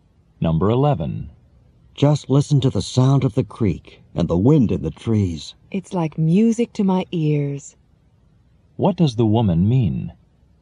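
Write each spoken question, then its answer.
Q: What does the woman mean?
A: She enjoys the sounds of nature.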